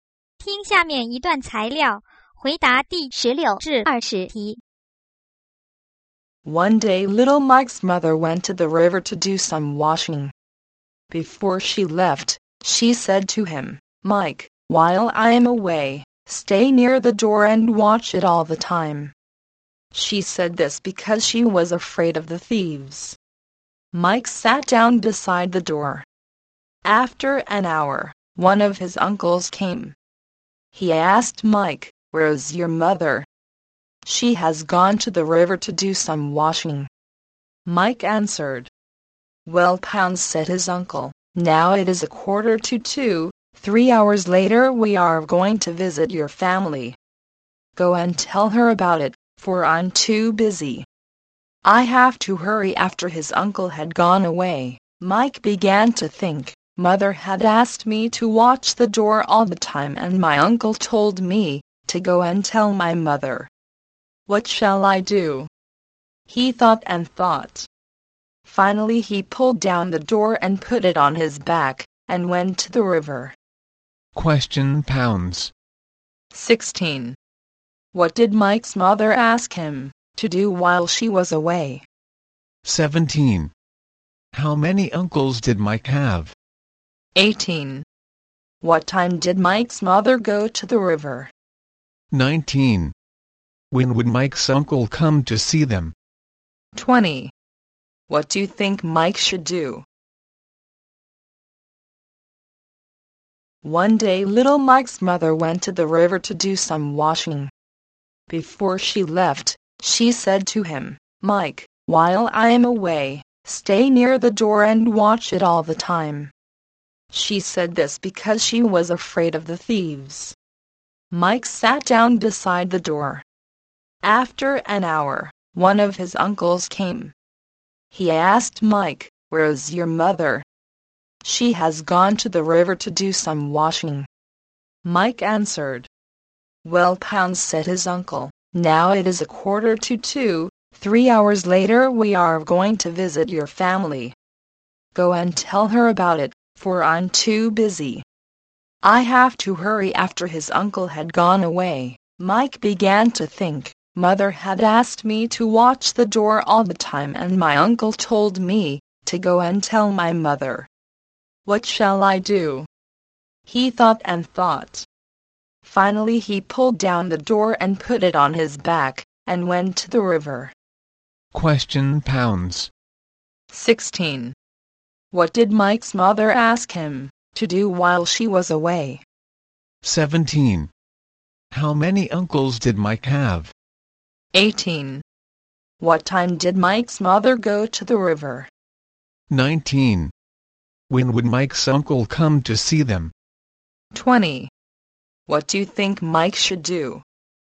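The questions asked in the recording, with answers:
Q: 16. What did Mike's mother ask him to do while she was away?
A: Stay near the door and watch it

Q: 19. When would Mike's uncle come to see them?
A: At 4:45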